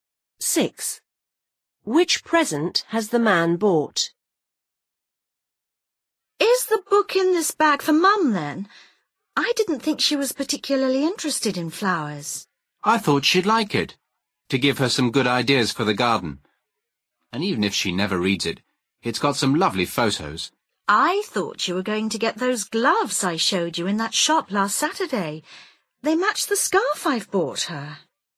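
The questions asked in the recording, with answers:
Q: Which present has the man bought?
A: A book about flowers/gardening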